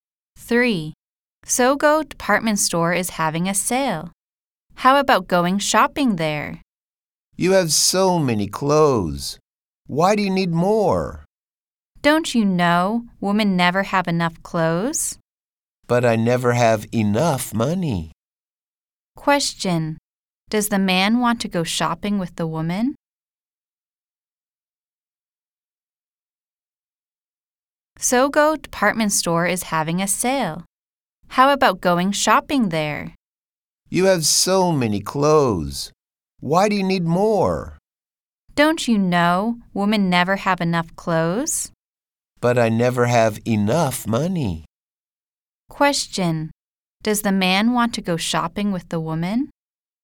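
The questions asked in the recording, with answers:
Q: Question. Does the man want to go shopping with the woman?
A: No, he doesn't have enough money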